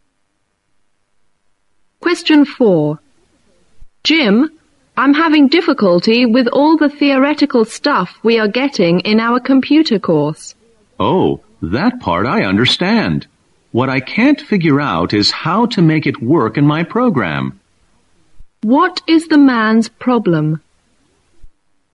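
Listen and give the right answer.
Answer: He can't figure out how to make the theory work in his program.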